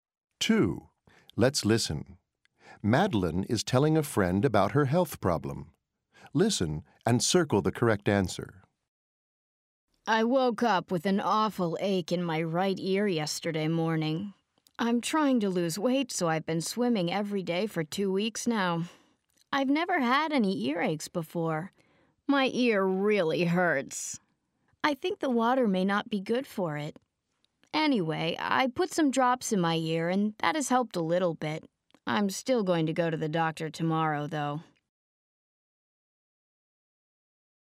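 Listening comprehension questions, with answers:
Madeleine is telling a friend about her health problem. Listen and circle the correct answer.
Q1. What's the problem?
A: An earache in her right ear

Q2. When did the problem start?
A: Yesterday morning

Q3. How often has she has this problem?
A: Never before

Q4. What did she do for it?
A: She put some drops in her ear

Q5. When will she see a doctor?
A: Tomorrow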